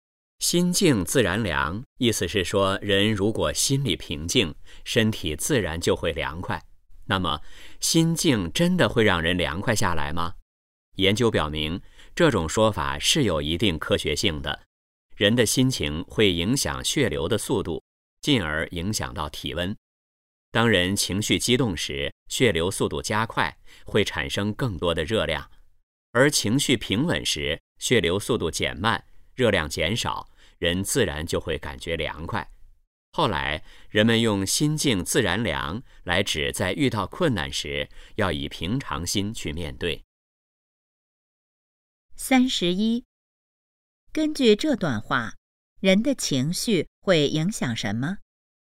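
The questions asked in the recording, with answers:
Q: 根据这段话,人的情绪会影响什么?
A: 血流速度(进而影响体温)

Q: 心静自然凉,告诉我们什么道理?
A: 遇到困难时要以平常心面对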